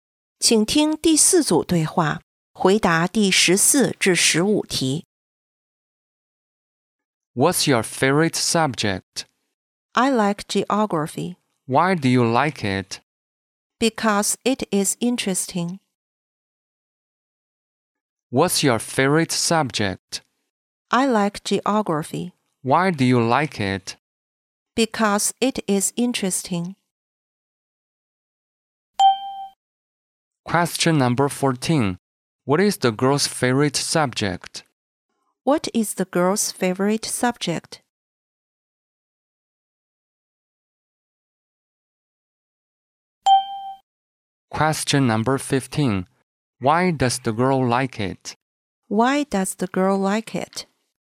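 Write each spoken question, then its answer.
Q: What is the girl's favorite subject?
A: Geography

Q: Why does the girl like it?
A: Because it is interesting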